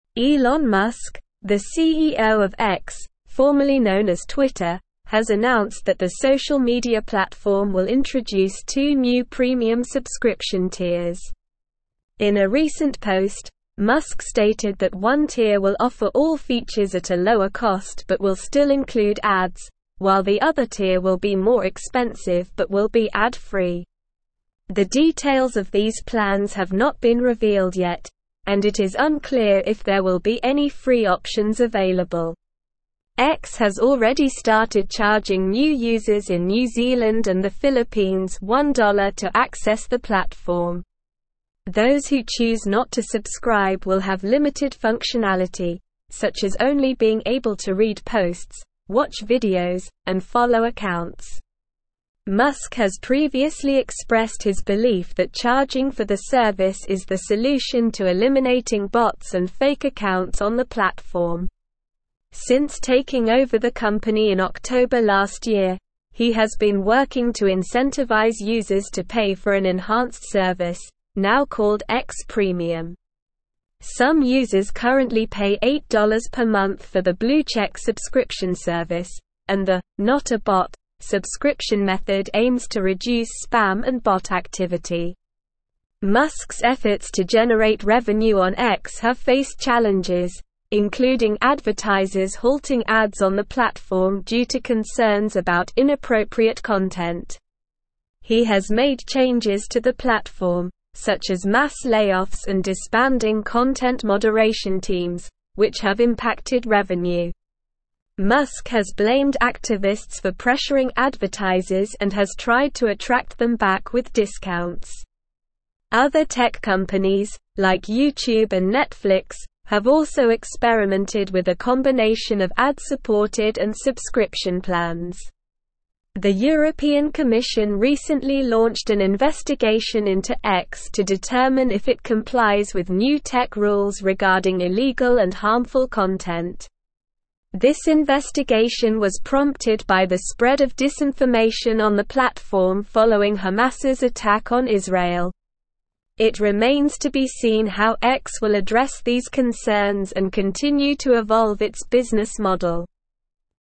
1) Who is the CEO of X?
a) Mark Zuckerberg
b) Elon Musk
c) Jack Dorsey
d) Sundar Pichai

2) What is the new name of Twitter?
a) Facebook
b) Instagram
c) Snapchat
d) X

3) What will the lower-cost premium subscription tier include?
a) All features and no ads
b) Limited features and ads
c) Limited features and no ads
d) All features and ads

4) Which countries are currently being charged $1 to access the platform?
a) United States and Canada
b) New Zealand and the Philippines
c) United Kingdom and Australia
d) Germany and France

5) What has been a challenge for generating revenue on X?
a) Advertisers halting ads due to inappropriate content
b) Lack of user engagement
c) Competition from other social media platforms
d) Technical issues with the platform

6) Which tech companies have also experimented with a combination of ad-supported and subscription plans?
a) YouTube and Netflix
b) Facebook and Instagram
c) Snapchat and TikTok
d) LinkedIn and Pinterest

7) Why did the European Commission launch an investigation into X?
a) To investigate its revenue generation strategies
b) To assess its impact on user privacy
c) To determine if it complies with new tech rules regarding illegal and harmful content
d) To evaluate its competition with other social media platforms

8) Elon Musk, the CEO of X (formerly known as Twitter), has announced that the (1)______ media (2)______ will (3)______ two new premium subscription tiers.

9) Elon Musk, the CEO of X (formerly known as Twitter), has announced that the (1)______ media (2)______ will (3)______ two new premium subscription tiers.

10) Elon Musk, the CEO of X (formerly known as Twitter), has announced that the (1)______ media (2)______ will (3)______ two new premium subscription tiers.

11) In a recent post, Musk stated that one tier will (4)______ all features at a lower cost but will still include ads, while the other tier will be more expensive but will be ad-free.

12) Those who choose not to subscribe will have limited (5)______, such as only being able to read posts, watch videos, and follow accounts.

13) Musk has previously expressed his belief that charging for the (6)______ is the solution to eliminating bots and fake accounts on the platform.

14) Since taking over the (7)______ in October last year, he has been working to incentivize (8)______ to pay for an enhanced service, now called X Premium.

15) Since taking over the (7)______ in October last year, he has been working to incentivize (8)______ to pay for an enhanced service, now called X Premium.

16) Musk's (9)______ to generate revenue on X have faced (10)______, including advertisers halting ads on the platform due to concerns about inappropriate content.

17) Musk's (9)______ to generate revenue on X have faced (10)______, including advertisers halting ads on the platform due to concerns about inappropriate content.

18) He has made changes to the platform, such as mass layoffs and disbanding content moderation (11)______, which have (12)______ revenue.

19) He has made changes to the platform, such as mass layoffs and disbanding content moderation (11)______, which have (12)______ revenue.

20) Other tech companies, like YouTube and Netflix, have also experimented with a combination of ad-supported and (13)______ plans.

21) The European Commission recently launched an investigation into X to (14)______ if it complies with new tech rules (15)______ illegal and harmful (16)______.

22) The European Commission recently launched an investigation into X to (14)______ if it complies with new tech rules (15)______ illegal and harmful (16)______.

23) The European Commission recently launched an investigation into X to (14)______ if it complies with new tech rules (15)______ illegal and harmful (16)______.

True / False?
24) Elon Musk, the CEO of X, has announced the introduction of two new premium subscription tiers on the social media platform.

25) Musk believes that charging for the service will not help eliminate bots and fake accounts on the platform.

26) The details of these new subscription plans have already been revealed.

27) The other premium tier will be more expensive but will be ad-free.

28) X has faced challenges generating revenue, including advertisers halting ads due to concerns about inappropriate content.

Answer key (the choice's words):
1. Elon Musk
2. X
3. All features and ads
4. New Zealand and the Philippines
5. Advertisers halting ads due to inappropriate content
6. YouTube and Netflix
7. To determine if it complies with new tech rules regarding illegal and harmful content
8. social
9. platform
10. introduce
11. offer
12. functionality
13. service
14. company
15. users
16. efforts
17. challenges
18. teams
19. impacted
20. subscription
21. determine
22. regarding
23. content
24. True
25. False
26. False
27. True
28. True

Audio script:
Elon Musk, the CEO of X (formerly known as Twitter), has announced that the social media platform will introduce two new premium subscription tiers. In a recent post, Musk stated that one tier will offer all features at a lower cost but will still include ads, while the other tier will be more expensive but will be ad-free. The details of these plans have not been revealed yet, and it is unclear if there will be any free options available.
X has already started charging new users in New Zealand and the Philippines $1 to access the platform. Those who choose not to subscribe will have limited functionality, such as only being able to read posts, watch videos, and follow accounts. Musk has previously expressed his belief that charging for the service is the solution to eliminating bots and fake accounts on the platform. Since taking over the company in October last year, he has been working to incentivize users to pay for an enhanced service, now called X Premium. Some users currently pay $8 per month for the blue check subscription service, and the "Not A Bot" subscription method aims to reduce spam and bot activity.
Musk's efforts to generate revenue on X have faced challenges, including advertisers halting ads on the platform due to concerns about inappropriate content. He has made changes to the platform, such as mass layoffs and disbanding content moderation teams, which have impacted revenue. Musk has blamed activists for pressuring advertisers and has tried to attract them back with discounts. Other tech companies, like YouTube and Netflix, have also experimented with a combination of ad-supported and subscription plans.
The European Commission recently launched an investigation into X to determine if it complies with new tech rules regarding illegal and harmful content. This investigation was prompted by the spread of disinformation on the platform following Hamas's attack on Israel. It remains to be seen how X will address these concerns and continue to evolve its business model.

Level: Level 4